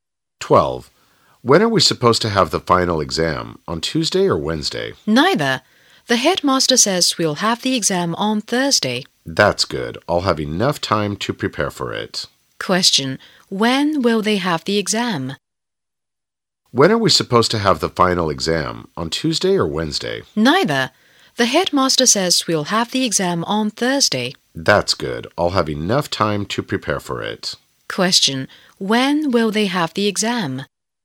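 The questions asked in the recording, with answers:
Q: Question. When will they have the exam?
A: On Thursday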